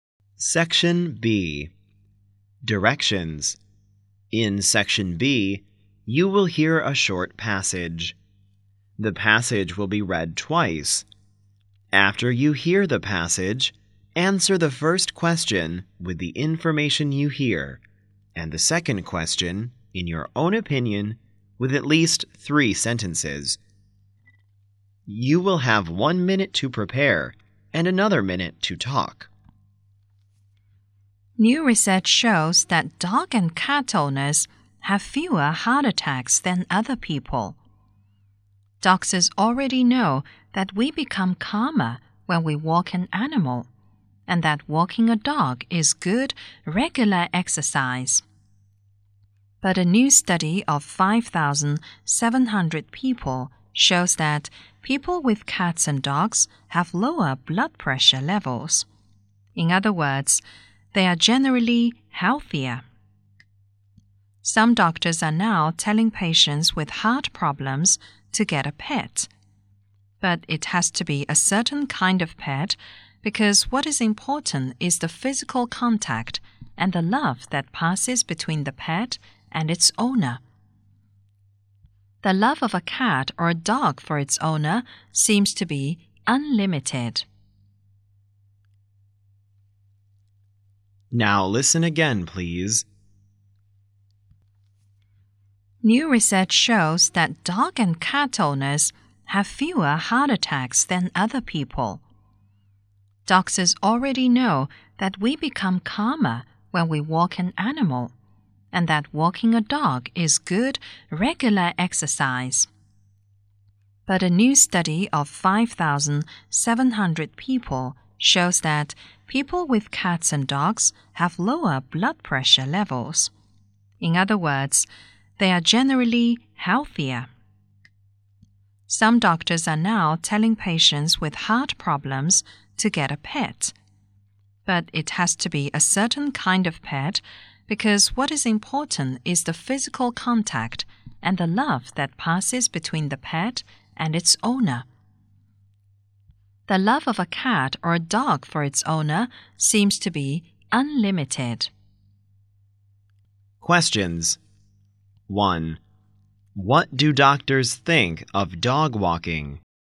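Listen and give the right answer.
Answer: It makes us calmer and is good, regular exercise.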